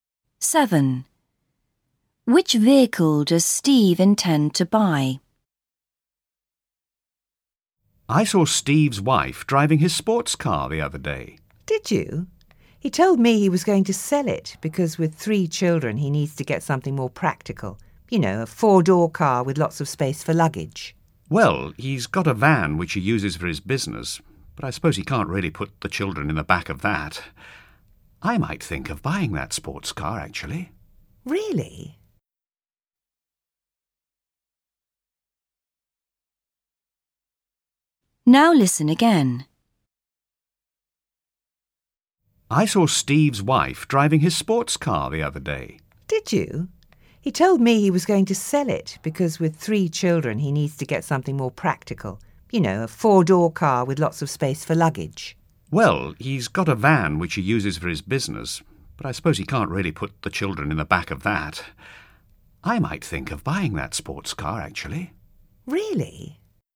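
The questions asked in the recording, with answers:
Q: Which vehicle does Steve intend to buy?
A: A 4-door car with lots of luggage space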